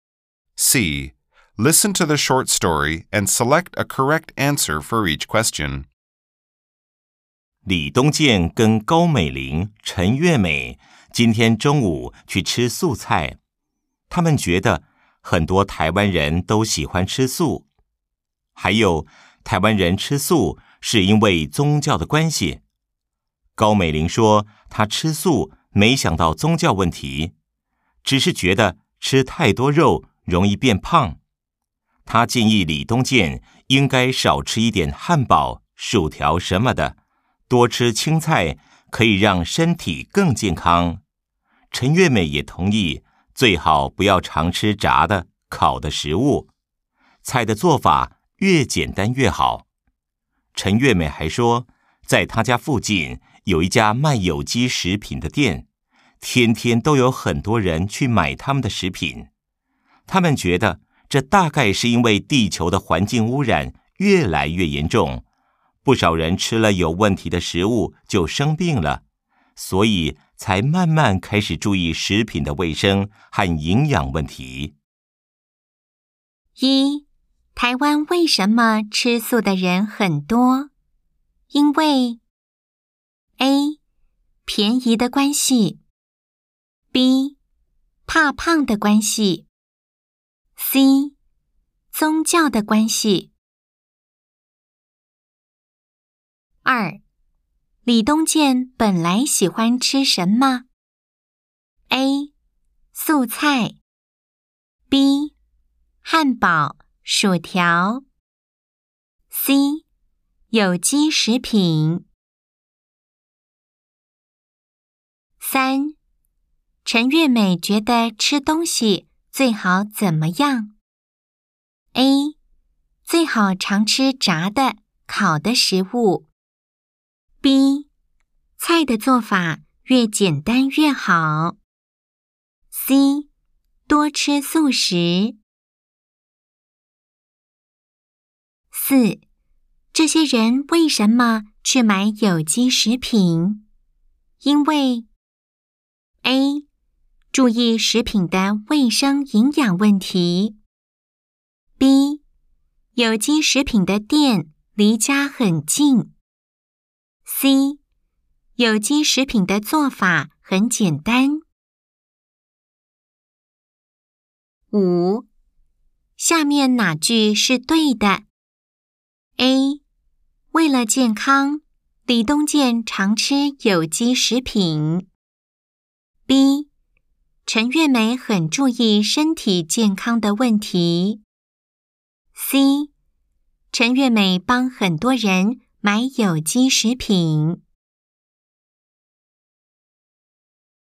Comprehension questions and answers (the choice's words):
Nghe câu chuyện ngắn và chọn câu trả lời đúng.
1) 台灣為什麼吃素的人很多?因為.....................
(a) 便宜的關係。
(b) 怕胖的關係。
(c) 宗教的關係。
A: 宗教的關係。

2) 李東健本來喜歡吃什麼?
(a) 素菜。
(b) 漢堡、薯條。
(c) 有機食品。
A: 漢堡、薯條。

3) 陳月美覺得吃東西最好怎麼樣?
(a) 最好常吃炸的、烤的食物。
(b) 菜的作法越簡單越好。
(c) 多吃素食。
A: 菜的作法越簡單越好。

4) 這些人為什麼去買有機食品?因為.....................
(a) 注意食品的衛生營養問題。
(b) 有機食品的店離家很近。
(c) 有機食品的作法很簡單。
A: 注意食品的衛生營養問題。

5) 下面哪句是對的?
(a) 為了健康,李東健常吃有機食品。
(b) 陳月美很注意身體健康的問題。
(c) 陳月美幫很多人買有機食品。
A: 陳月美很注意身體健康的問題。